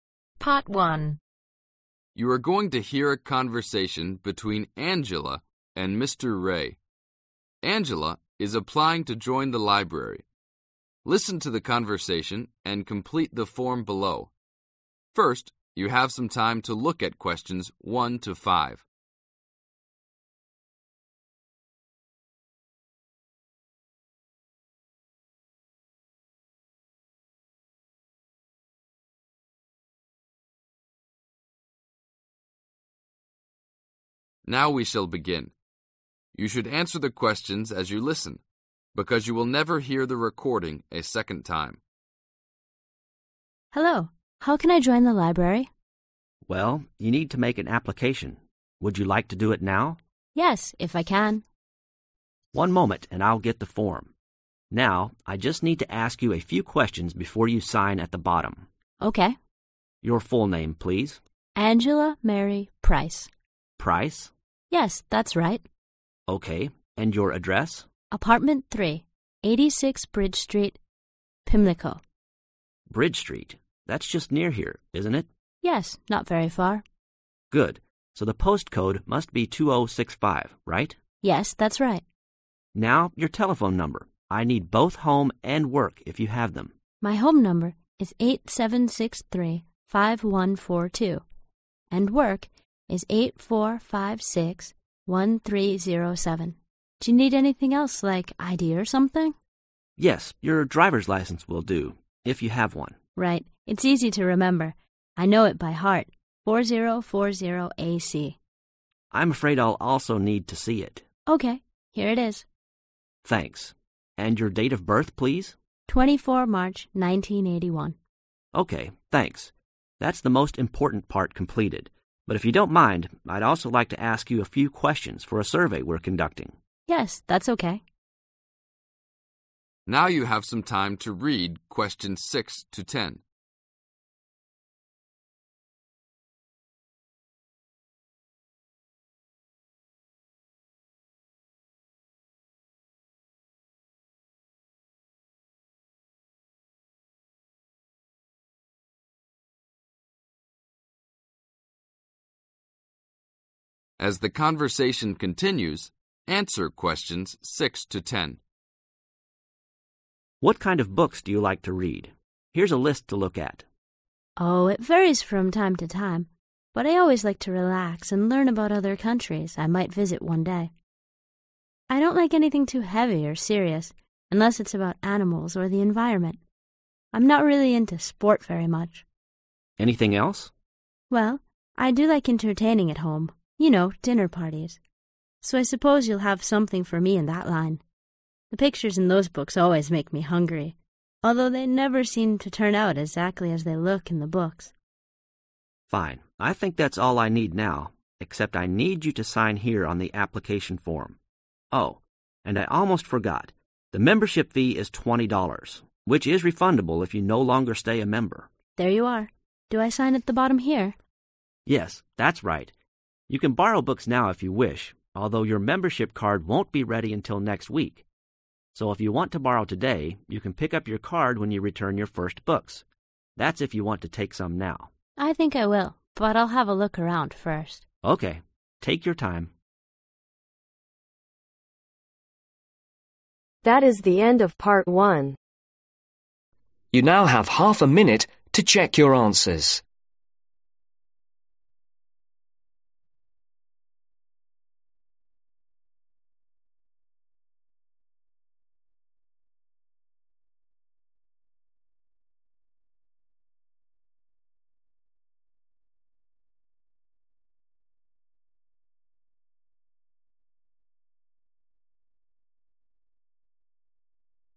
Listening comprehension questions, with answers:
Complete the form below. Write ONE WORD OR A NUMBER for each answer.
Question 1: Address: Apartment 3, 86 (1)............ Street, Pimlico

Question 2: Post code: (2)............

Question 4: Driver's License Number: (4)............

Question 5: Date of Birth: Day: 24 Month: (5)............ Year: 1981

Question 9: How much does it cost to join the library ?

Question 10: When will Angela's card be ready ?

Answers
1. Bridge
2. 2065
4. 4040AC
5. March
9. $20/twenty dollars
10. next week/in a week/in one week/the following week